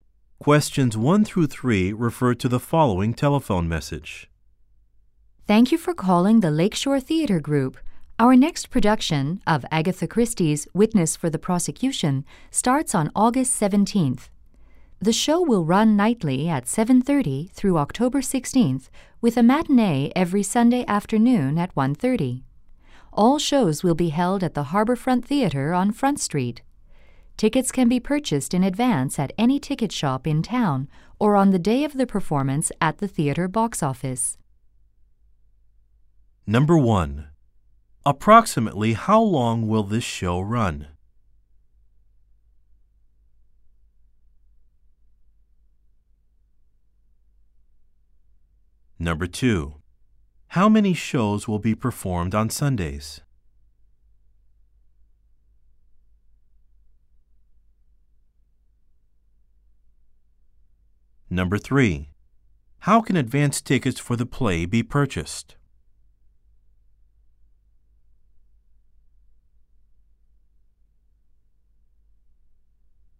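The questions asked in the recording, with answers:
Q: Approximately how long will this show run?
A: About two months (August 17th through October 16th)

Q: How many shows will be performed on Sundays?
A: Two (a 1:30 matinee and the 7:30 evening show)

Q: How can advance tickets for the play be purchased?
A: At any ticket shop in town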